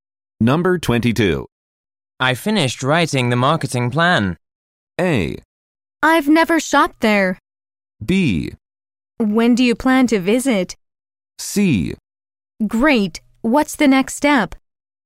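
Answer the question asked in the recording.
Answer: C: Great. What's the next step?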